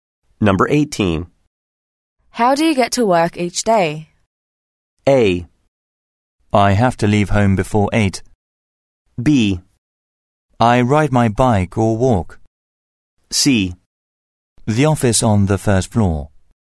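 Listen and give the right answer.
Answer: B: I ride my bike or walk.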